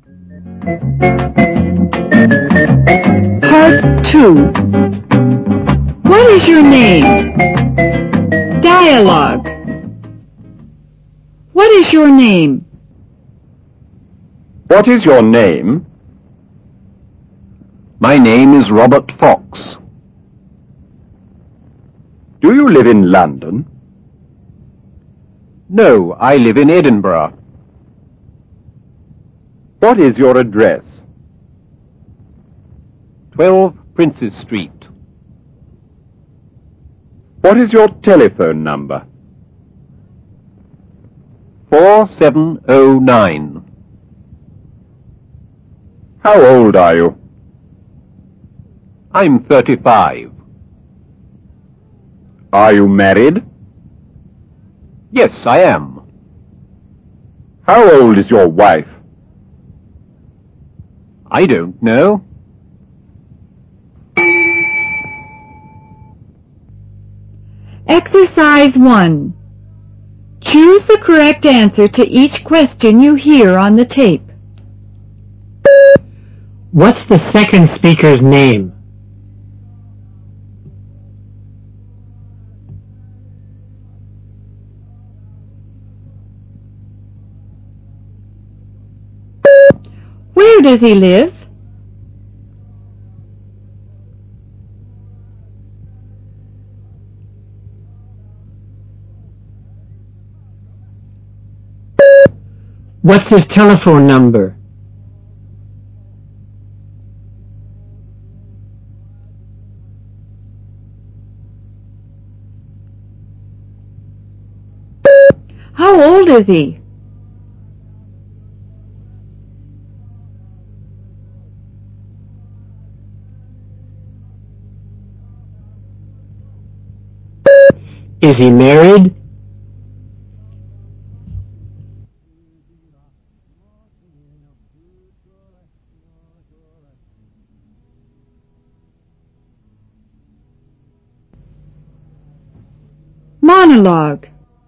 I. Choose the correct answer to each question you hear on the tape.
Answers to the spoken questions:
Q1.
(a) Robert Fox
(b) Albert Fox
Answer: (a) Robert Fox
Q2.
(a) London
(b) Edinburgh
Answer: (b) Edinburgh
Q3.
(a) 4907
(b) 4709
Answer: (b) 4709
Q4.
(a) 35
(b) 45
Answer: (a) 35
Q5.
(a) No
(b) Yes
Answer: (b) Yes